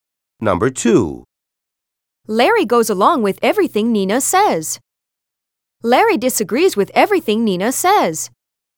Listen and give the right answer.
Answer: Different is the correct answer.